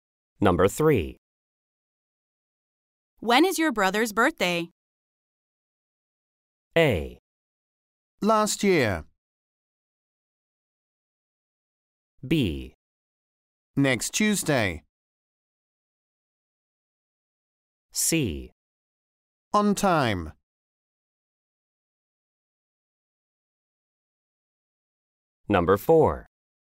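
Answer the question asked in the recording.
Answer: B: Next Tuesday.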